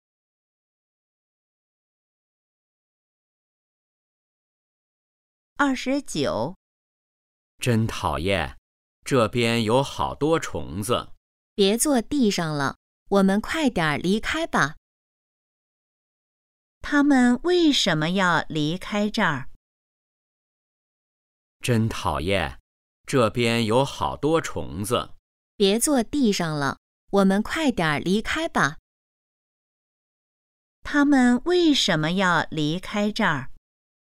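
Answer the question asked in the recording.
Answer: 这边有好多虫子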